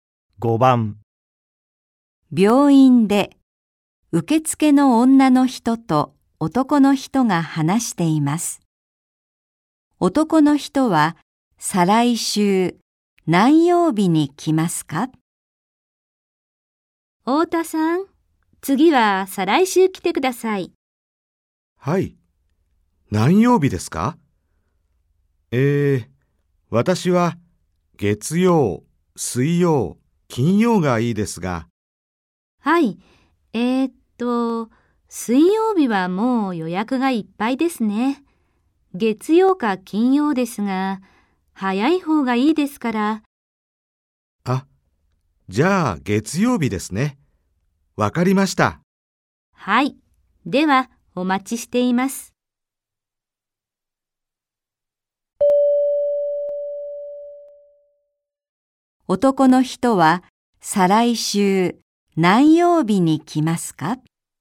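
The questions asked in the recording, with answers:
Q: 男の人は再来週何曜日に来ますか?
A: 月曜日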